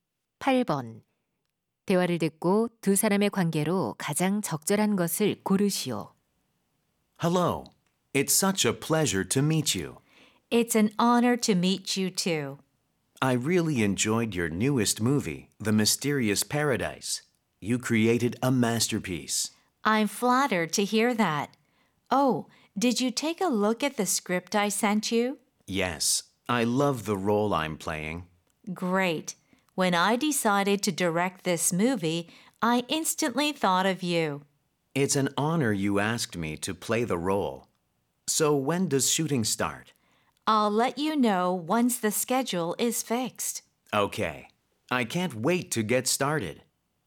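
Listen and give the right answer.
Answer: 영화감독 - 배우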